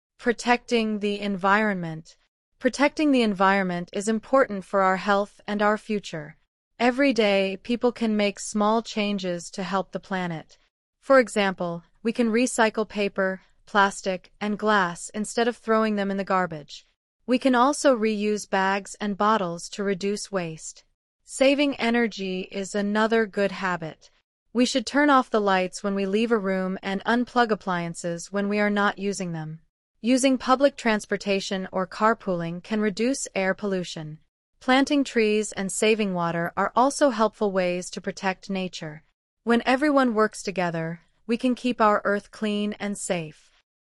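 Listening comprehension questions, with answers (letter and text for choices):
II. Choose the correct Answer:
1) The paragraph suggests that protecting the environment is:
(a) Only the government's job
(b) Something people can do daily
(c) Too difficult for individuals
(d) Expensive and complicated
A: (b) Something people can do daily

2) What idea connects recycling and reusing?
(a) They both create more waste.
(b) They help reduce the amount of garbage.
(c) They use more electricity.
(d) They cost more money.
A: (b) They help reduce the amount of garbage.

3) If someone always leaves lights on in empty rooms, what is most likely to happen?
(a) They will save energy.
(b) They will reduce pollution.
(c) They will waste electricity.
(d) They will protect nature.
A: (c) They will waste electricity.

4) Why is carpooling mentioned in the paragraph?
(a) To show a way to reduce pollution from cars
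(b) To explain how to travel faster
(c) To encourage people to buy cars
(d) To describe city traffic problems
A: (a) To show a way to reduce pollution from cars

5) Which action shows responsibility toward natural resources?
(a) Using more plastic bags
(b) Ignoring recycling rules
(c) Saving water at home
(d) Driving short distances alone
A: (c) Saving water at home

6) What do turning off lights and unplugging appliances have in common?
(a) They make homes brighter.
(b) They reduce energy use.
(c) They increase electricity bills.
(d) They waste resources.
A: (b) They reduce energy use.

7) The paragraph implies that small actions are:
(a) Useless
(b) Only helpful for children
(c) Powerful when many people do them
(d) Difficult to maintain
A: (c) Powerful when many people do them

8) Why are trees important according to the text?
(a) They make cities more crowded.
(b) They are part of protecting nature.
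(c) They replace public transportation.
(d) They produce garbage.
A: (b) They are part of protecting nature.

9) Which person is following the advice in the paragraph?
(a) Someone who throws bottles in regular trash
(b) Someone who drives everywhere alone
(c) Someone who brings reusable bags to the store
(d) Someone who leaves appliances plugged in all day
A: (c) Someone who brings reusable bags to the store

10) What is the overall message of the paragraph?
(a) Environmental problems are impossible to solve.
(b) Only experts can protect the Earth.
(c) Everyday habits can help keep the Earth clean and safe.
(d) Protecting nature takes a lot of money.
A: (c) Everyday habits can help keep the Earth clean and safe.

I. Answer the following questions: (Use complete sentences)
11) Why is protecting the environment important?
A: It is important for our health and our future.

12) Name two materials we can recycle.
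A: Paper and plastic (or glass).

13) What should we do instead of throwing things in the garbage?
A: We should recycle them.

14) How can we reduce waste at home?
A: We can reuse bags and bottles.

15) What should we do when we leave a room?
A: We should turn off the lights.

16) How can unplugging appliances help the environment?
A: It saves energy.

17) What transportation choices can reduce air pollution?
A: Using public transportation or carpooling.

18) How can planting trees help the Earth?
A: It helps protect nature.

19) What natural resource should we save besides energy?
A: Water.

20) What happens when everyone works together?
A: We can keep our earth clean and safe.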